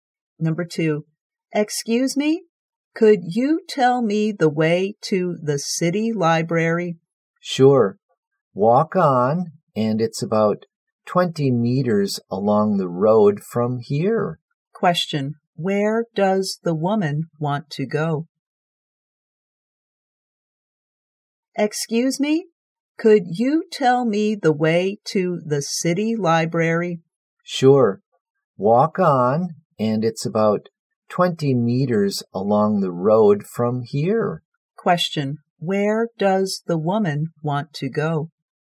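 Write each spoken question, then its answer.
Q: where does the woman want to go?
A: The city library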